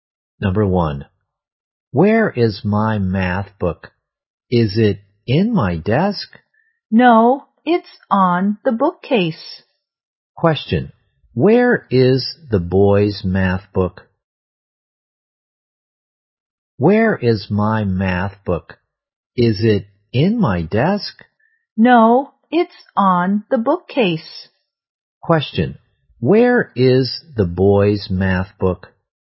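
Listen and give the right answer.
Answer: On the bookcase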